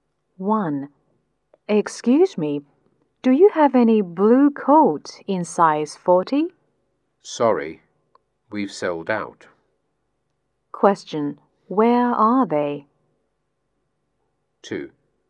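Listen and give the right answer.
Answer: In a clothes shop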